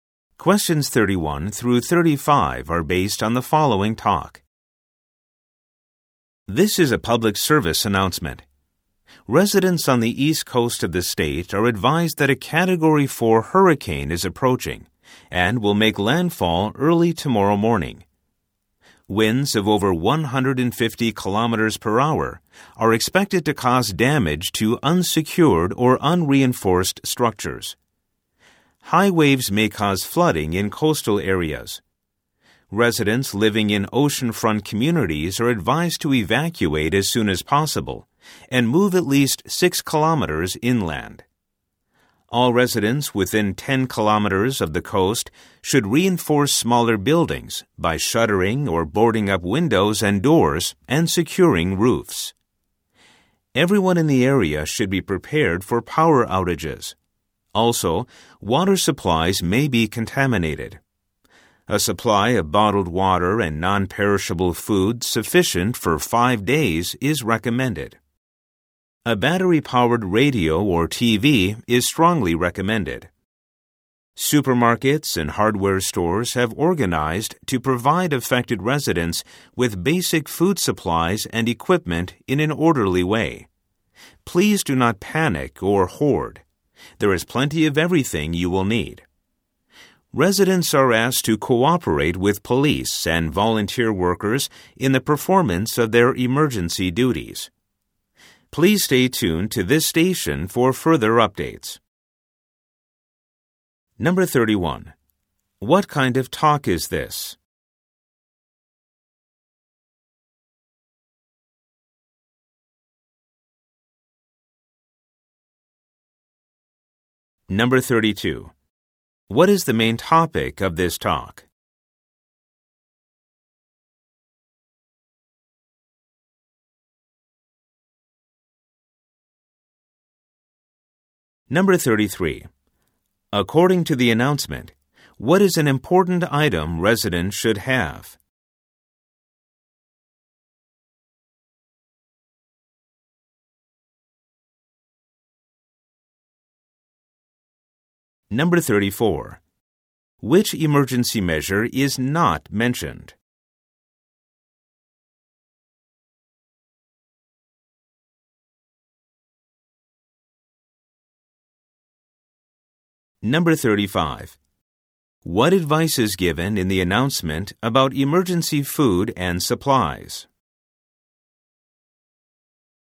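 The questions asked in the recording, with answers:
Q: What kind of talk is this?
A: A public service announcement

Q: What is the main topic of this talk?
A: An approaching hurricane

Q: What advice is given in the announcement about emergency food and supplies?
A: Do not panic or hoard; there is plenty.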